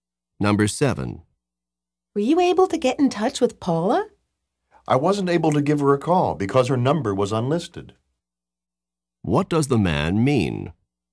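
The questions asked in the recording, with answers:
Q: What does the man mean?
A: He couldn't call Paula because her number was unlisted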